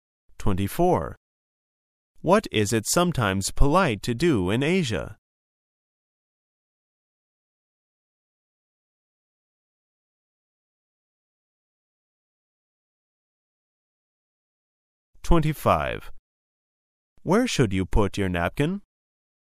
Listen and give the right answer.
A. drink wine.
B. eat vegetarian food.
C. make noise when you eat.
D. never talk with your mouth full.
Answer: C. make noise when you eat.

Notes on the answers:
考察听取文章思路和重点信息的能力。关键是抓住"they jumped out the window,and splat!...made a mess hitting all over the ground"这句话。splat是个象声词,翻译为"吧唧",如果这个不懂,可以听到后面hitting all over the ground,撞到地面上,从10层楼撞到地面,则必死无疑。